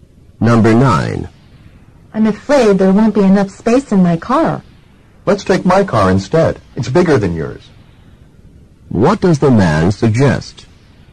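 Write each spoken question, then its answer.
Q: What does the man suggest?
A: Taking his car because it's bigger.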